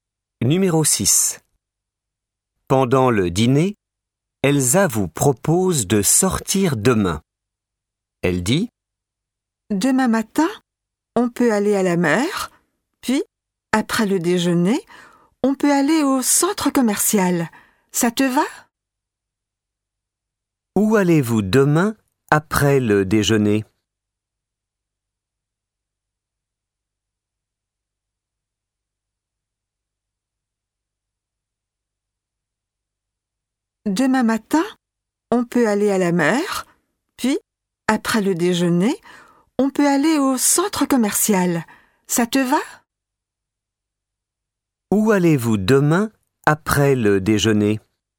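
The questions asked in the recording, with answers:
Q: Où allez-vous demain après le déjeuner ?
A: Au centre commercial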